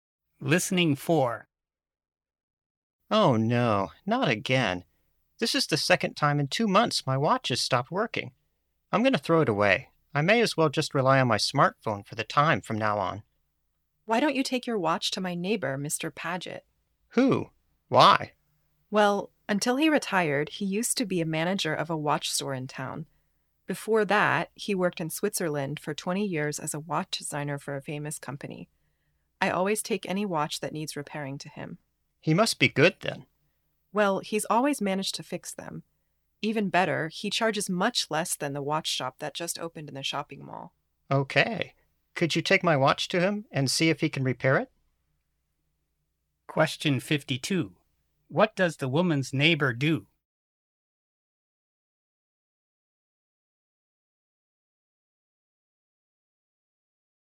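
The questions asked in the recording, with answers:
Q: What does the woman's neighbor do?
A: He repairs watches (he is a retired watch store manager)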